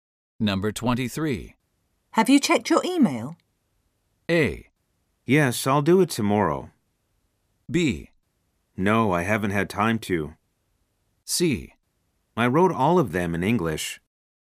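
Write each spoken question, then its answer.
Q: Have you checked your email?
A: B: No, I haven't had time to.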